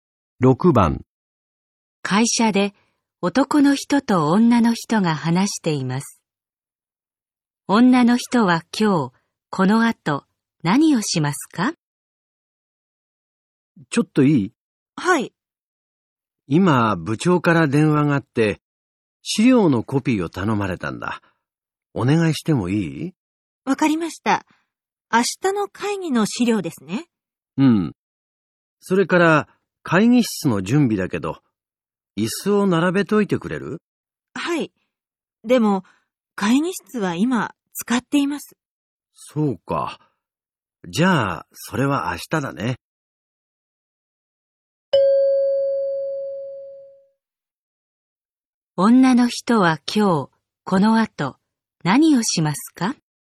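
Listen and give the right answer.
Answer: 資料のコピー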